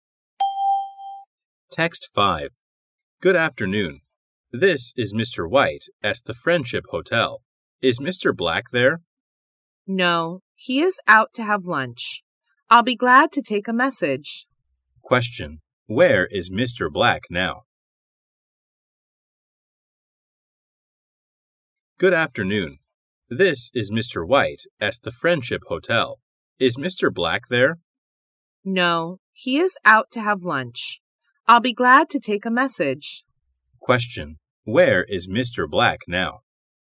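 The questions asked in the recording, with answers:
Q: Where is Mr. Black now?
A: Out having lunch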